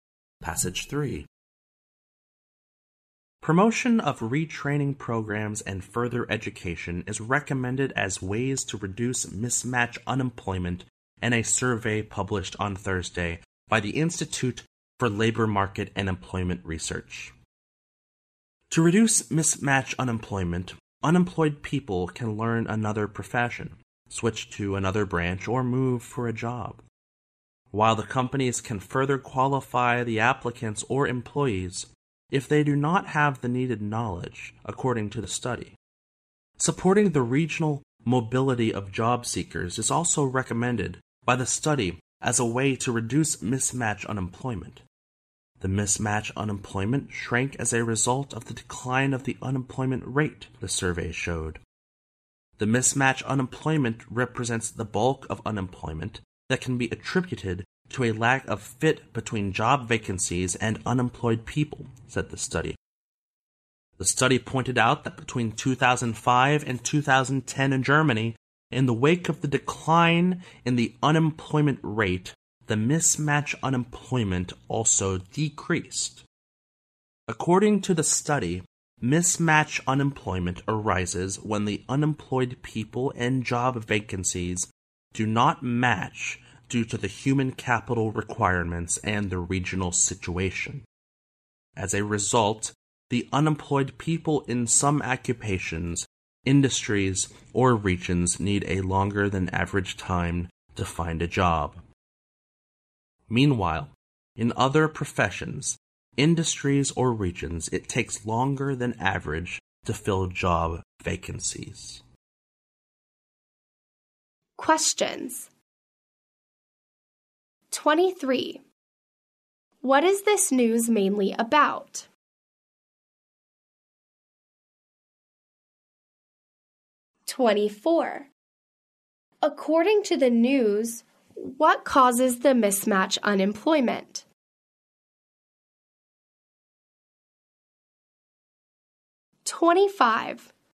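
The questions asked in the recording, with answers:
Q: What is this news mainly about?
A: Ways to reduce mismatch unemployment, such as retraining and further education

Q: According to the news, what causes the mismatch unemployment?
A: A mismatch between unemployed people and job vacancies due to human capital requirements and the regional situation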